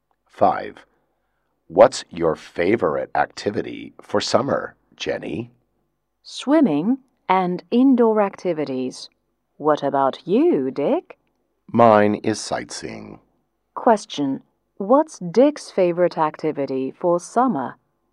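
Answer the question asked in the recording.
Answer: Sightseeing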